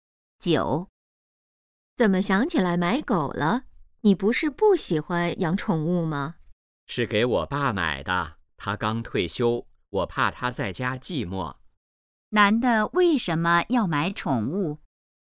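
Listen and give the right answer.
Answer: 怕刚退休的爸爸在家寂寞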